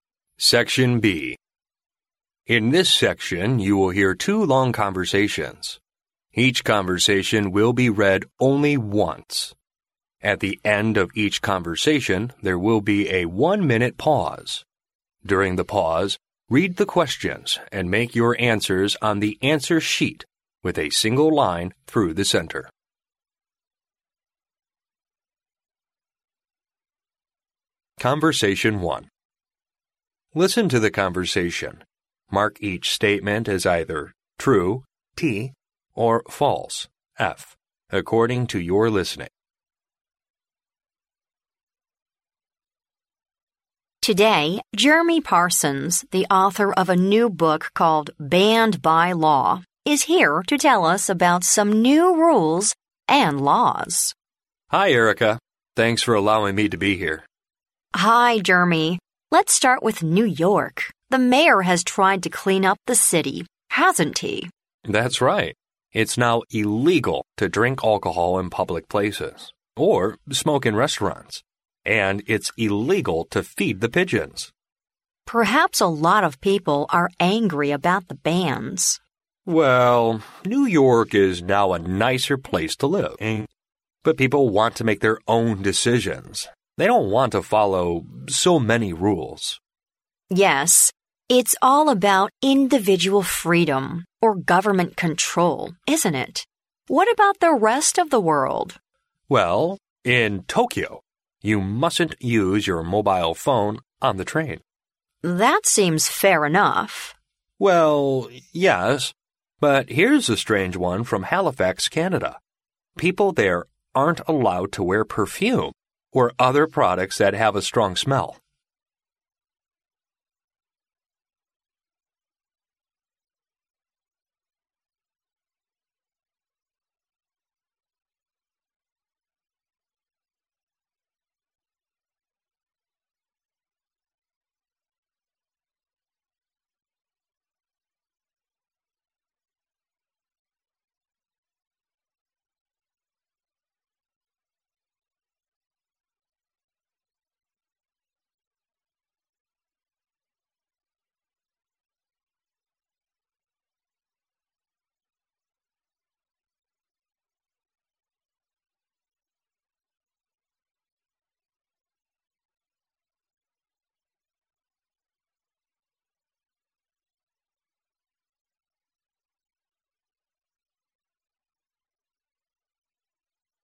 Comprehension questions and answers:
Listen to the conversation, mark each statement as either true (T) or false (F) according to your listening.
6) The speakers are talking about how Jeremy published his new book.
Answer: F

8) Some people may not be very happy about the new rules in New York.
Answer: T

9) Erica isn't in favour of banning mobile phone use on the train in Tokyo.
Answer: F

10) If you go to Halifax, you can wear perfume in public places.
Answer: F

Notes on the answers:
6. 录音开篇Erica便提及"Jeremy Parsons...is here to tell us about some new rules and laws.",关于书则只提及Jeremy Parsons为作者,而他们讨论的并非该书。故该判断错误。
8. 录音中Jeremy提到"they don't want to follow so many rules",由此可推测有些人会因为规定太多,受到更多限制,而并不欢迎这些新规定。故该判断正确。
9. 录音中在Jeremy提及东京火车上不得使用手机的规定时,Erica的回应是"That seems fair enough",由此可知Erica认为这种规定"似乎还算公平",而非持反对意见。故该判断错误。
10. 录音最后Jeremy谈到在哈利法克斯,"People there aren't allowed to wear perfume",由此可知在哈利法克斯人们在公共场合是不能喷香水的。故该判断错误。

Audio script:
W: Today, Jeremy Parsons, the author of a new book called Banned by Law , is here to tell us about some new rules and laws.
M: Hi, Erica. Thanks for allowing me to be here.
W: Hi, Jeremy. Let's start with New York. The mayor has tried to clean up the city, hasn't he?
M: That's right. It's now illegal to drink alcohol in public places, or smoke in restaurants. And it's illegal to feed the pigeons!
W: Perhaps a lot of people are angry about the bans.
M: Well, New York is now a nicer place to live in. But people want to make their own decisions; they don't want to follow so many rules.
W: Yes, it's all about individual freedom, or government control, isn't it? What about the rest of the world?
M: Well, in Tokyo you mustn't use your mobile phone on the train.
W: That seems fair enough.
M: Well, yes, but here's a strange one from Halifax, Canada. People there aren't allowed to wear perfume, or other products that have a strong smell.